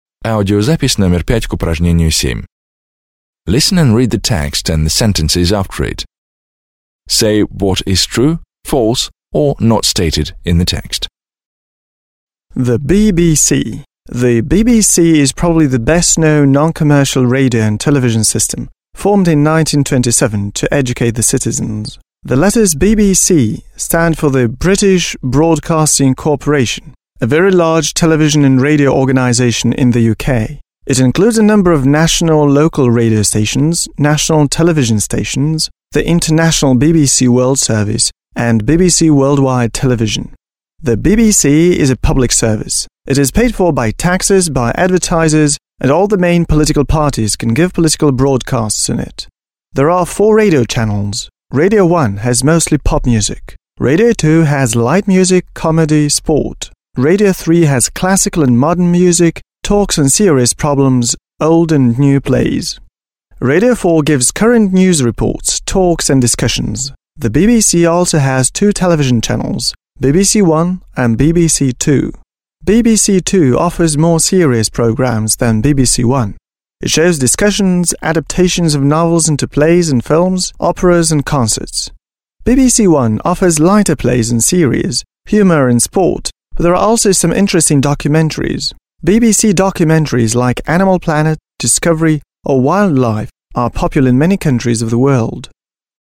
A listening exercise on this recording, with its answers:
7. D. Answer the questions about the BBC. − Ответьте на вопросы о BBC.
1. What do the letters BBC stand for?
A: The letters BBC stand for the British Broadcasting Corporation.

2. When and why was the BBC formed?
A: The BBC was formed in 1927 to educate the British citizens.

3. What parts does the BBC consist of?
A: The BBC consists of national and local radio stations, national television stations, the international BBC World Service and BBC Worldwide Television.

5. How can the British political parties use the BBC?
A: The British political parties can give political broadcasts on it.

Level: 9 класс